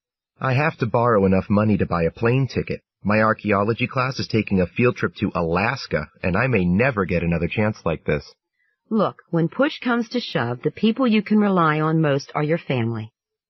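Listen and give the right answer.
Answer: Ask his family to lend him the money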